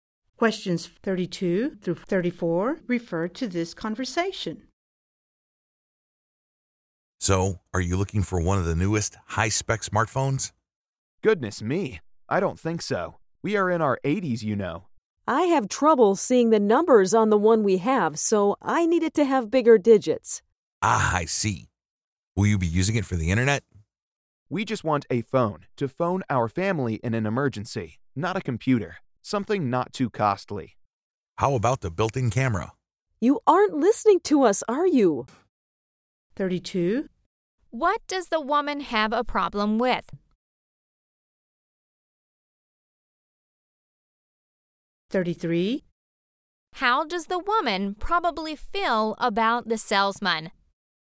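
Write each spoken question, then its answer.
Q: How does the woman probably feel about the salesman?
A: Annoyed; he isn't listening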